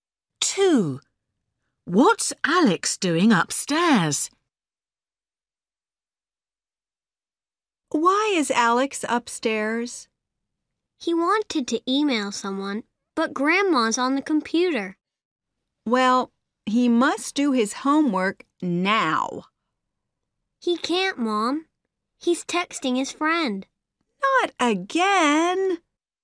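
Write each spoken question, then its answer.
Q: What's Alex doing upstairs?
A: Texting his friend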